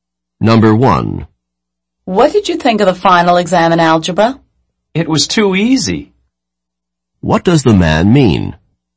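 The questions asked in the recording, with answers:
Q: What does the man mean?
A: The algebra final exam was too easy.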